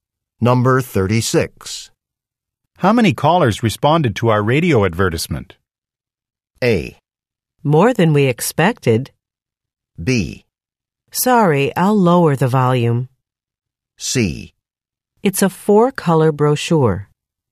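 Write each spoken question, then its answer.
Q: How many callers responded to our radio advertisement?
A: A: More than we expected.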